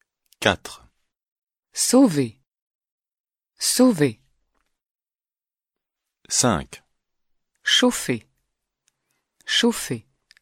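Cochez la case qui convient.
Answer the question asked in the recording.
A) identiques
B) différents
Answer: A) identiques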